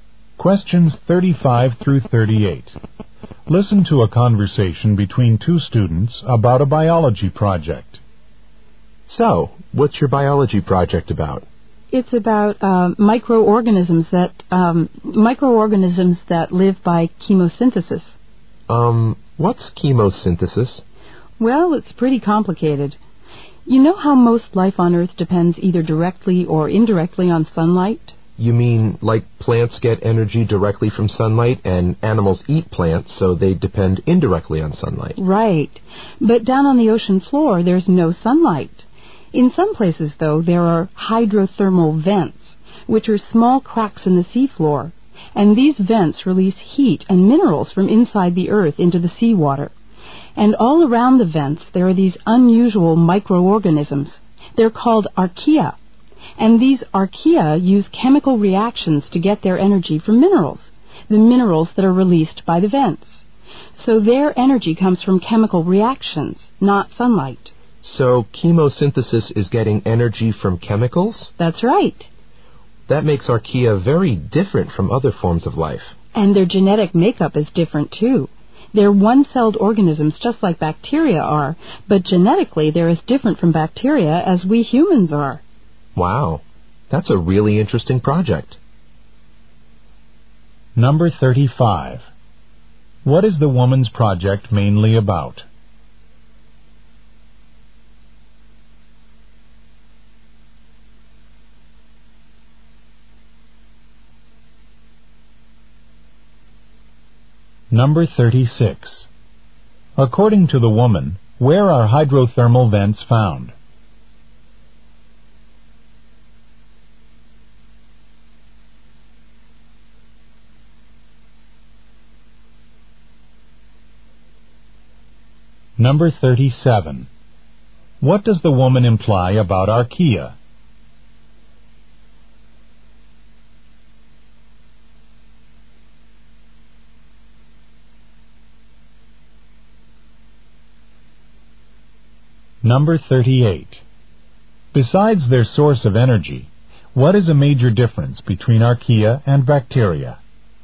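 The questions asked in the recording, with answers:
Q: What is the woman's project mainly about?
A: Microorganisms that live by chemosynthesis.

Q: According to the woman, where are hydrothermal vents found?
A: On the ocean floor.

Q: What does the woman imply about archaea?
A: They don't depend on sunlight.

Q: Besides their source of energy, what is a major difference between archaea and bacteria?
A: Their genetic makeup.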